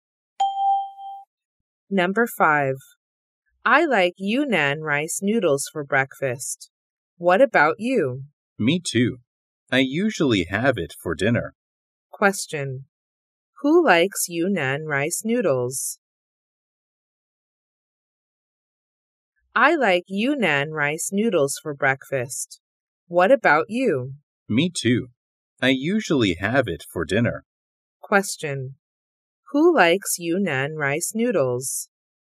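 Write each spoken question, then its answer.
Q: Who likes Yunnan rice noodles?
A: Both speakers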